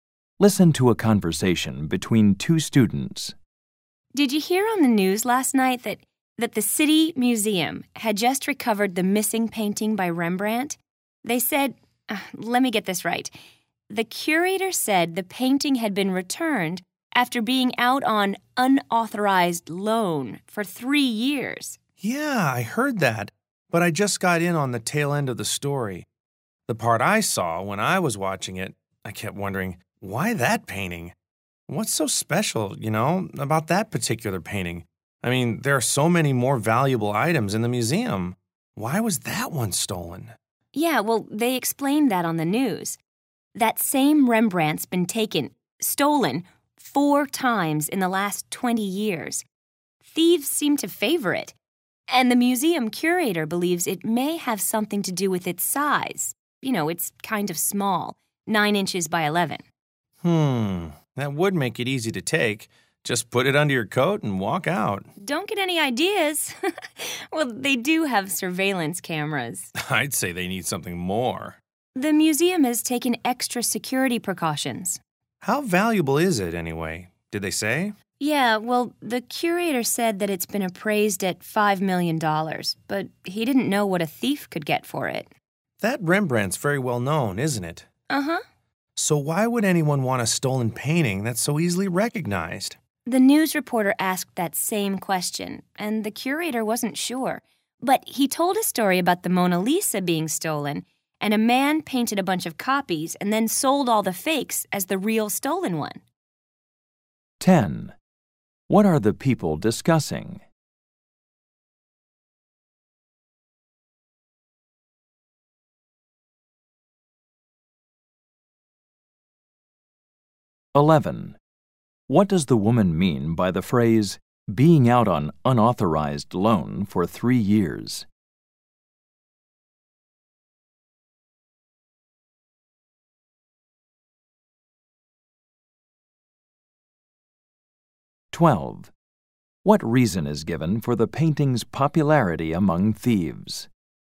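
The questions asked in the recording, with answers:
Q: What are the people discussing?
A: A Rembrandt painting that was stolen from the City Museum and has now been recovered

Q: What does the woman mean by the phrase, being out on unauthorized loan for 3 years?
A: The painting had been stolen for 3 years

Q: What reason is given for the painting's popularity among thieves?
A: It is small (9 by 11 inches), so it is easy to take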